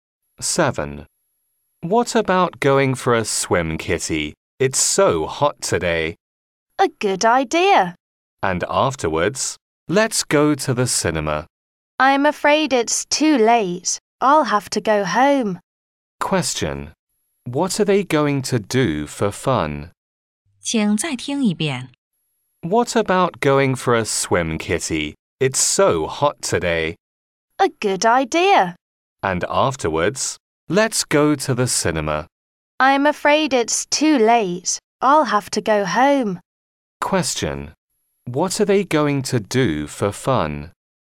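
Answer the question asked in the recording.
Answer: Go swimming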